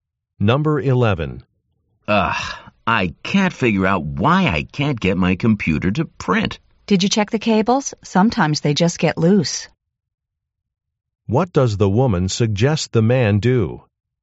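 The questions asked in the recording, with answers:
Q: What does the woman suggest the man do?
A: Check the cables.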